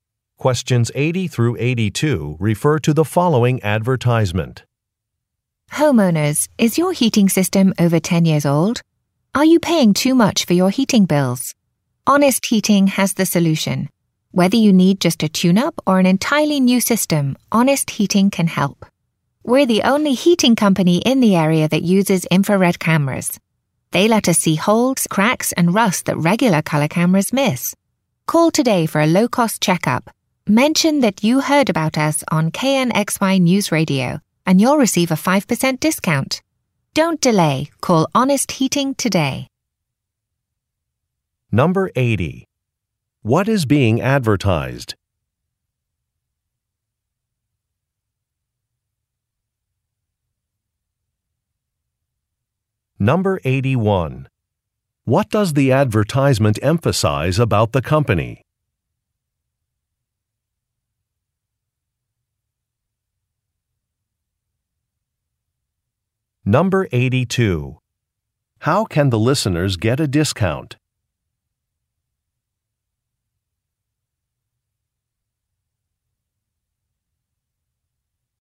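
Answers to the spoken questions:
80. A heating company's services
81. It is the only local heating company that uses infrared cameras
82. By mentioning that they heard about it on KNXY News Radio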